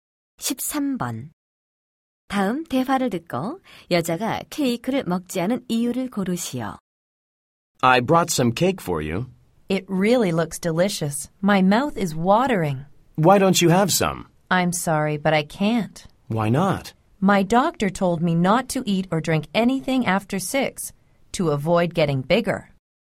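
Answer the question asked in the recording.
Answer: 의사가 6시 이후에 아무것도 먹지 말라고 해서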